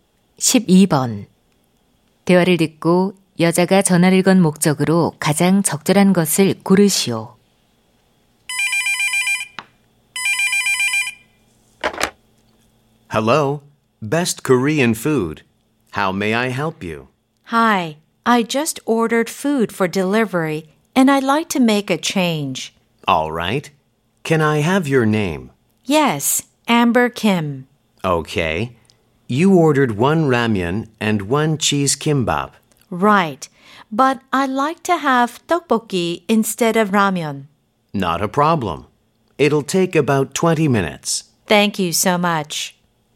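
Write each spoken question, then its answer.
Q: 대화를 듣고 여자가 전화를 건 목적으로 가장 적절한 것을 고르시오.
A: 주문 변경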